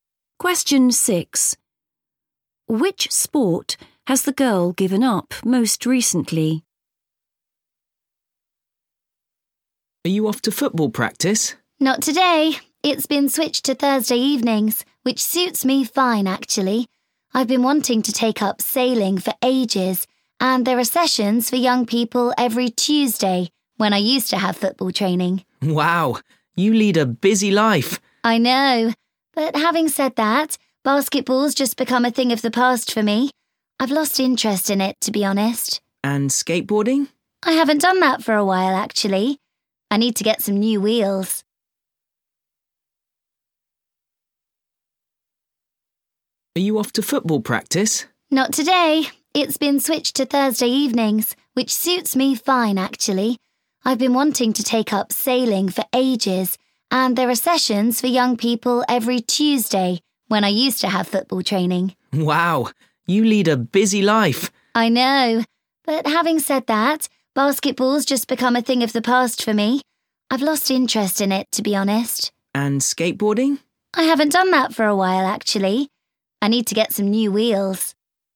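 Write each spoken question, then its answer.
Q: Which sport has the girl given up most recently?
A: basketball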